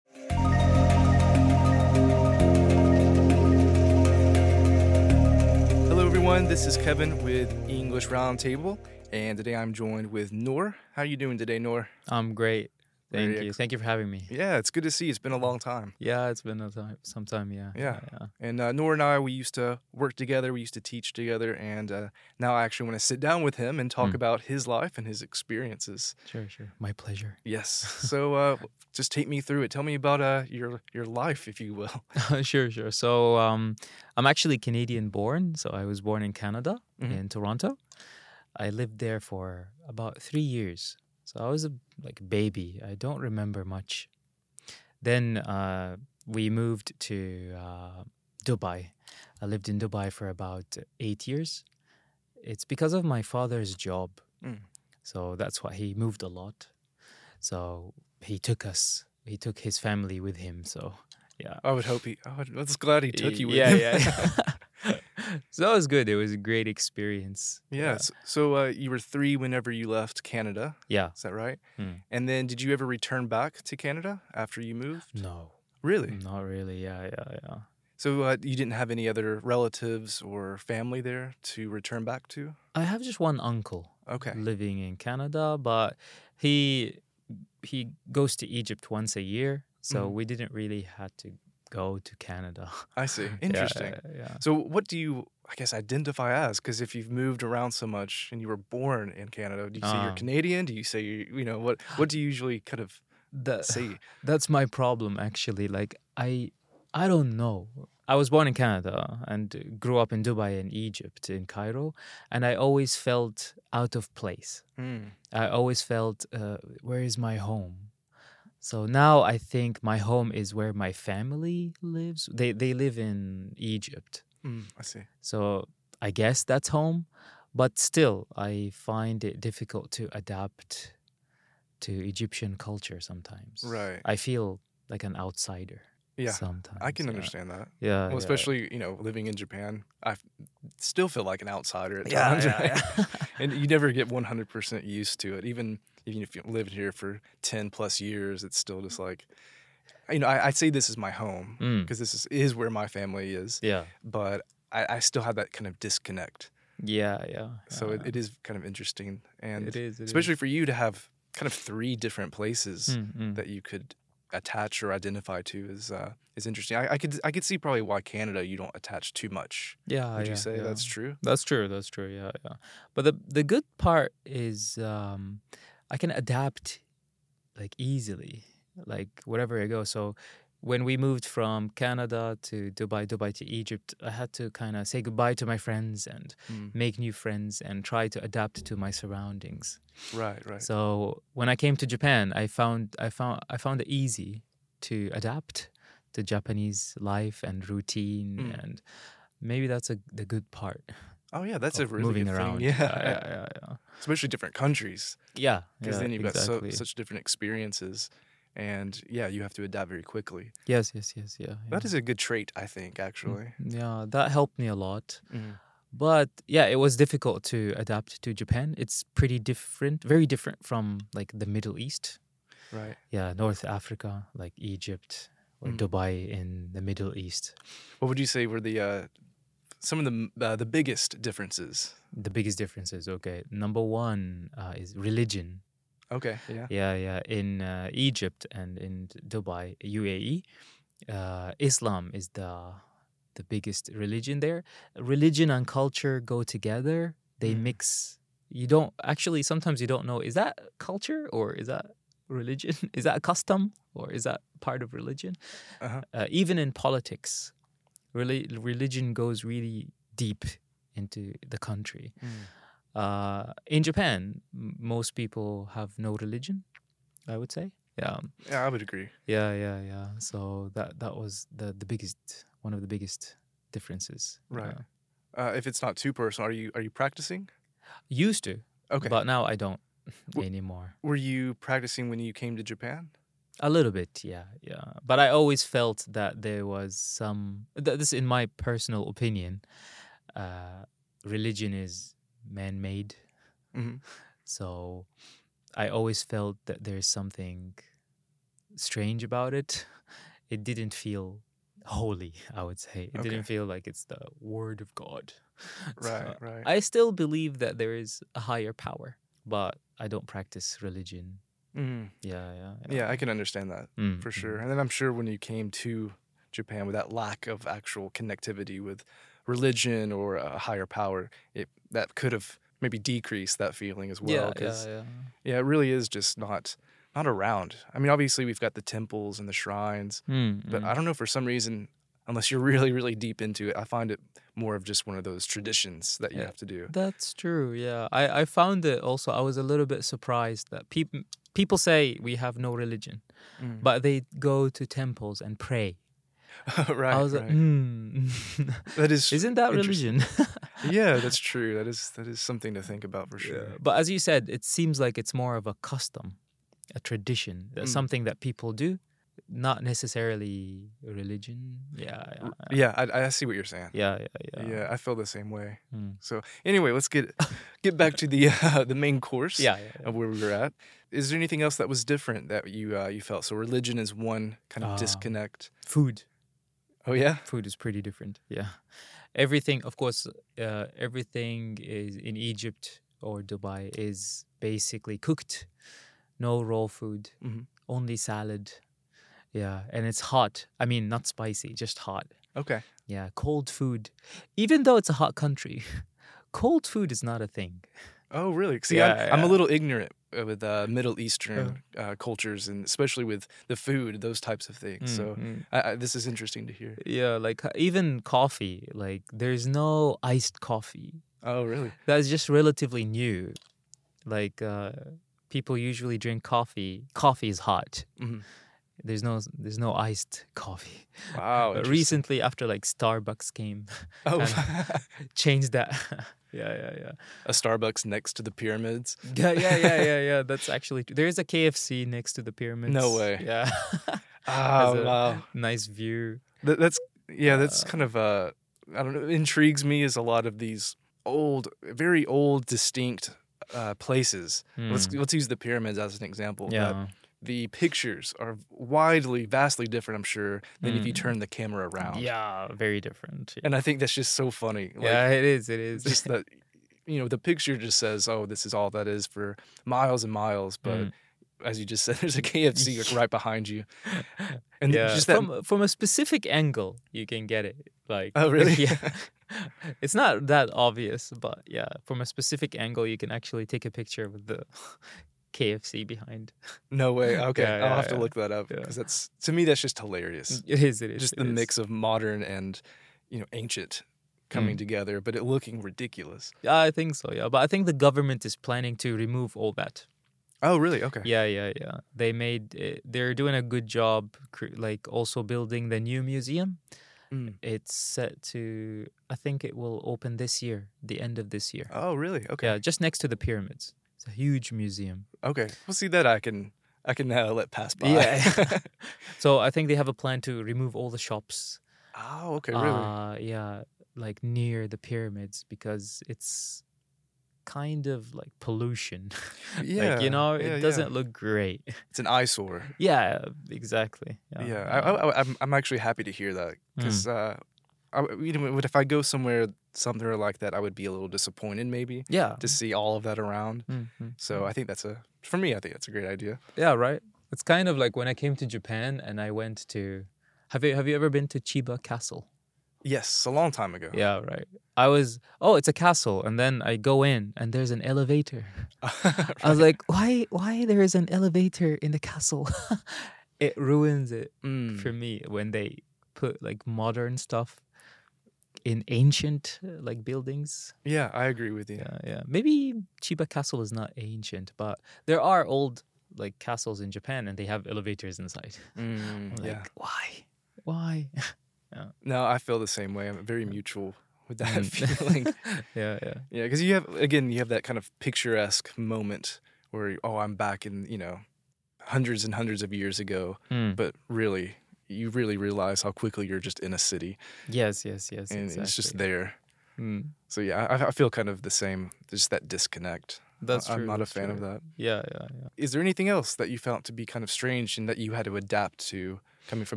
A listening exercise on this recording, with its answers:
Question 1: Where was Nour born?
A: Canada

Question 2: How old was Nour when he moved from his home country?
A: 3 years old